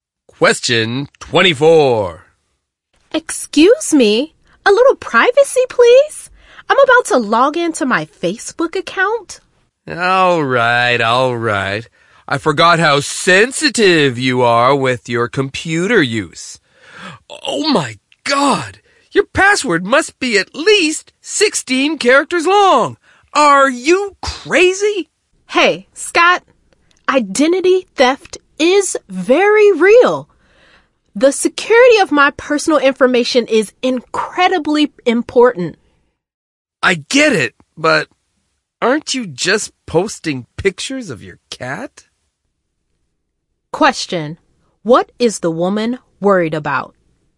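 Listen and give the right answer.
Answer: Identity theft and the security of her personal information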